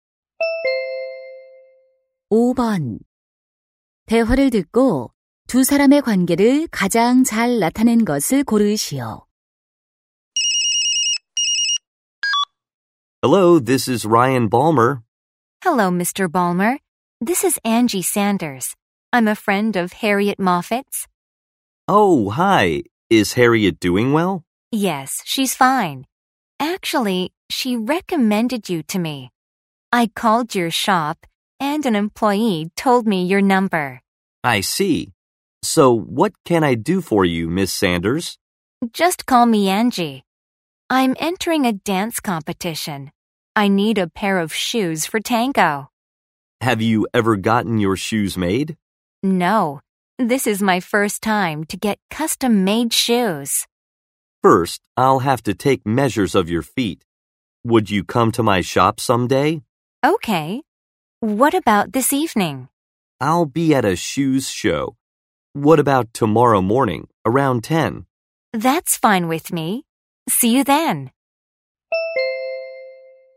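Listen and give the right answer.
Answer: 고객 - 맞춤 구두 제작자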